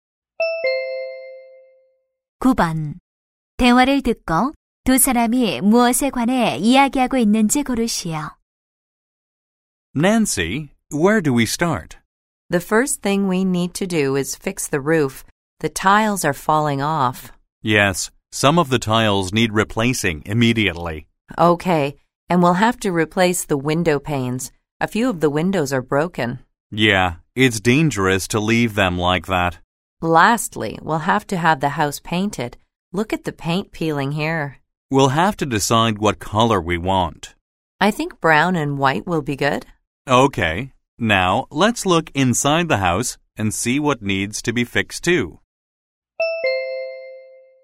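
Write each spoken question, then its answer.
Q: 두 사람이 무엇에 관해 이야기하고 있는지 고르시오.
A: 집 수리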